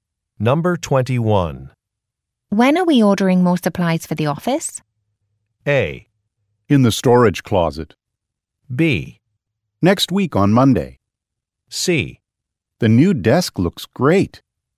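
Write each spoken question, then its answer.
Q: When are we ordering more supplies for the office?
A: B: Next week on Monday.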